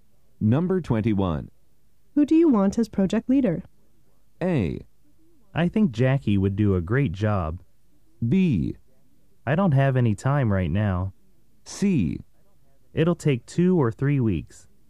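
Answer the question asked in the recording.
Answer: A: I think Jackie would do a great job.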